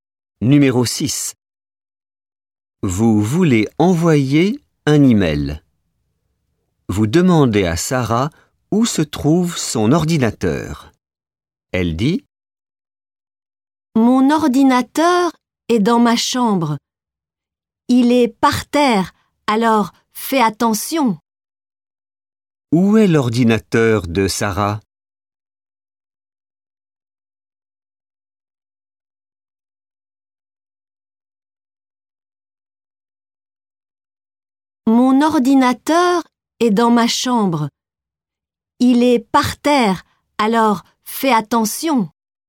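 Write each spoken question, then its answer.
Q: Où est l'ordinateur de Sarah?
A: dans sa chambre, par terre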